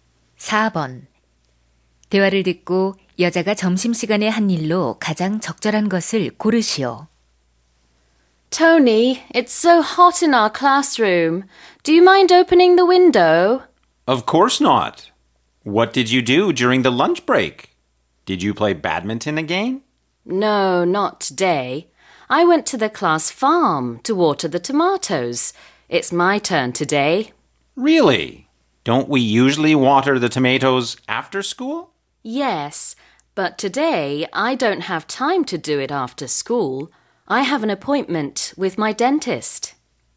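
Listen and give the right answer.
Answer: 학급 농장에서 토마토에 물 주기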